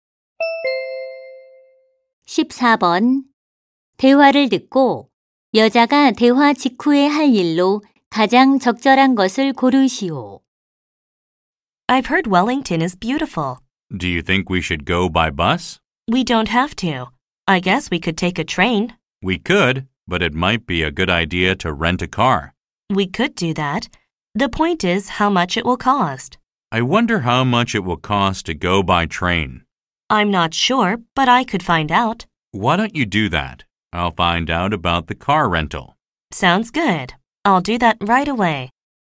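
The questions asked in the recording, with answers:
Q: 대화를 듣고 여자가 대화 직후에 할 일로 가장 적절한 것을 고르시오.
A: 기차 요금 알아보기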